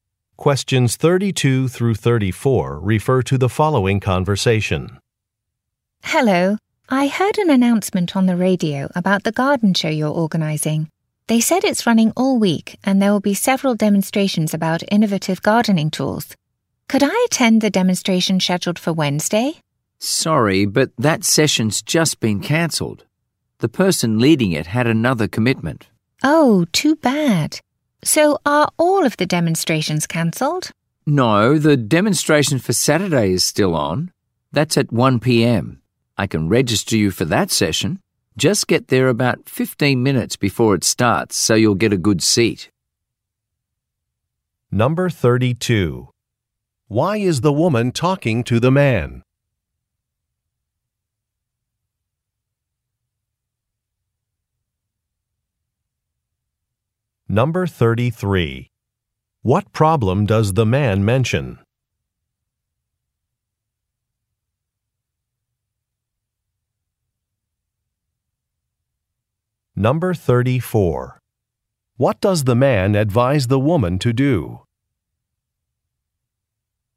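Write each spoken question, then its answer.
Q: Why is the woman talking to the man?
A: To attend (register for) a gardening demonstration at the garden show

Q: What problem does the man mention?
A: The Wednesday session has been cancelled

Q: What does the man advise the woman to do?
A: Arrive about 15 minutes early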